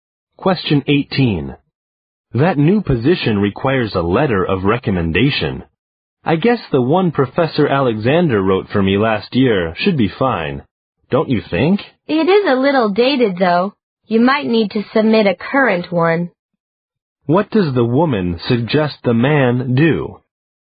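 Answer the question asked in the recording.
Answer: Get a current letter of recommendation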